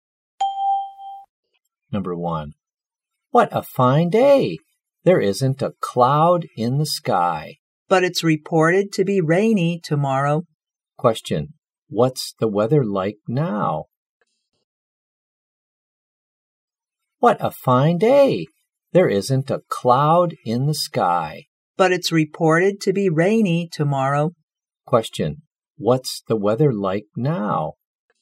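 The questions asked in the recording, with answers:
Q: What's the weather like now?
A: Sunny and clear, with no clouds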